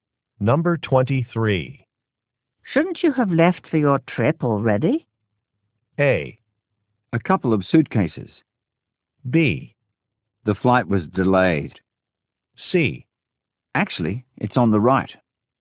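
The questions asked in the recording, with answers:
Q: Shouldn't you have left for your trip already?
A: B: The flight was delayed.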